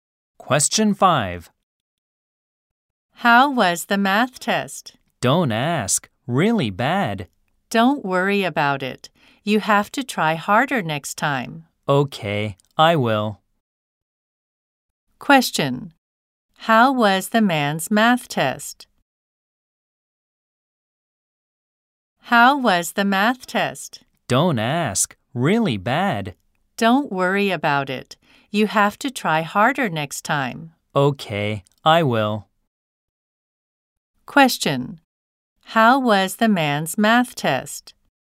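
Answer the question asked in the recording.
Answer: Really bad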